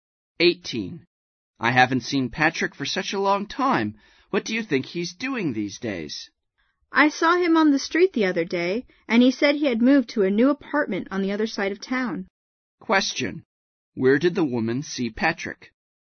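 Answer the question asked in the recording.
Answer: On the street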